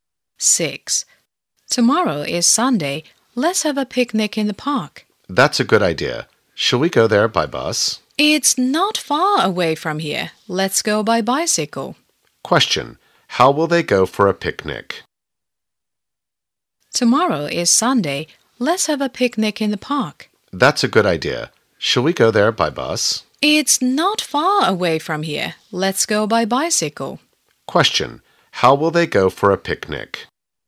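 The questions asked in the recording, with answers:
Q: How will they go for a picnic?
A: By bicycle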